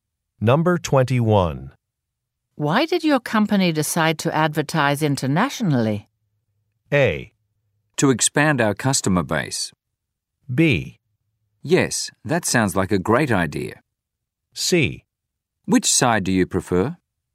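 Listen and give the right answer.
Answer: A: To expand our customer base.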